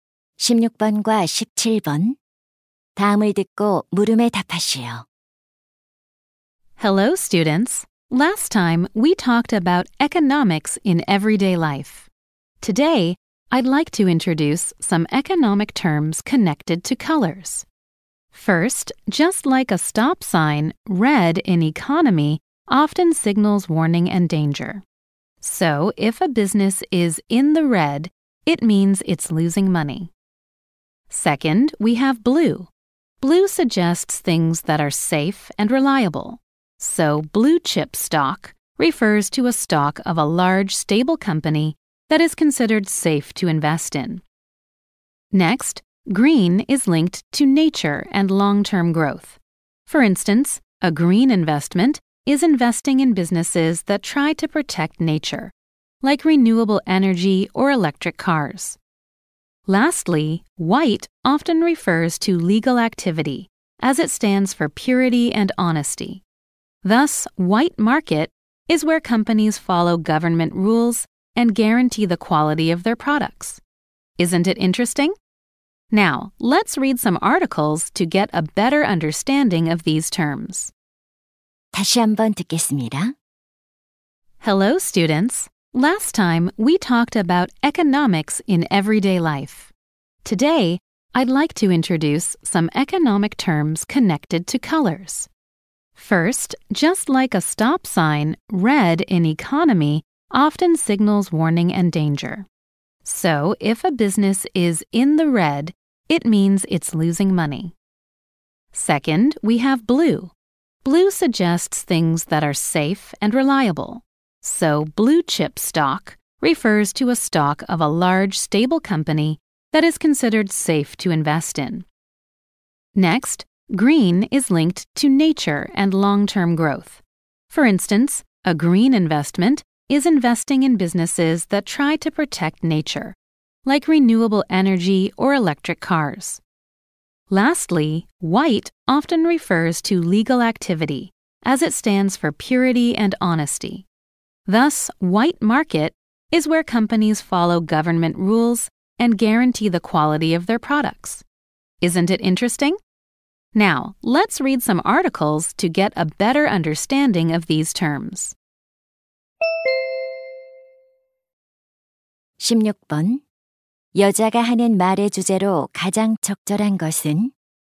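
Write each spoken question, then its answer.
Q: 여자가 하는 말의 주제로 가장 적절한 것은?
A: 색깔과 관련된 경제 용어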